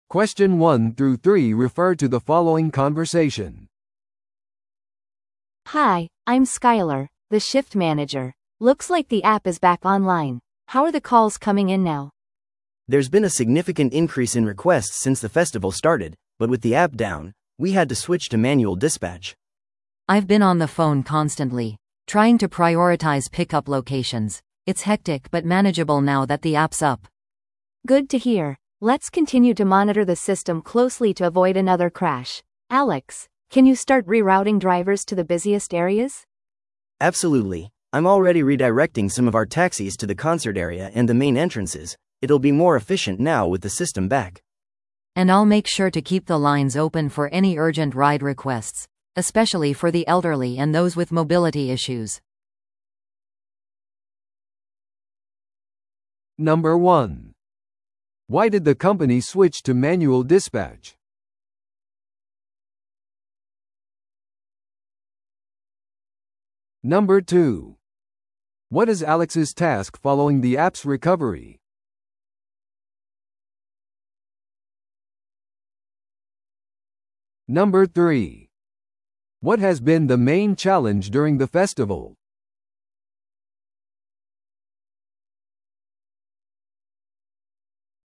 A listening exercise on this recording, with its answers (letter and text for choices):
Listen to the audio below and answer the questions.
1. Why did the company switch to manual dispatch?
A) ドライバーが要求したから。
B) アプリが一時的にオフラインだったから。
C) 利用可能な車が多すぎた。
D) 顧客が直接電話を好むから。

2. What is Alex's task following the app's recovery?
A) 顧客のフィードバックに答える。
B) ドライバーを活動中の場所に再ルーティングする。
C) アプリの技術的問題を修正する。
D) システムクラッシュに関する報告書の準備。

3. What has been the main challenge during the festival?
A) ドライバーとのコミュニケーション。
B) 大量の乗車リクエストを処理する。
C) フェスティバルのイベントを再スケジュールする。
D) 参加者にリフレッシュメントを提供する。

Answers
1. B) アプリが一時的にオフラインだったから。
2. B) ドライバーを活動中の場所に再ルーティングする。
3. B) 大量の乗車リクエストを処理する。

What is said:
Looks like the app is back online. How are the calls coming in now?
B: There's been a significant increase in requests since the festival started, but with the app down, we had to switch to manual dispatch.
C: I've been on the phone constantly, trying to prioritize pickup locations. It's hectic but manageable now that the app's up.
A: Good to hear. Let's continue to monitor the system closely to avoid another crash. Alex, can you start rerouting drivers to the busiest areas?
B: Absolutely. I'm already redirecting some of our taxis to the concert area and the main entrances. It'll be more efficient now with the system back.
C: And I'll make sure to keep the lines open for any urgent ride requests, especially for the elderly and those with mobility issues.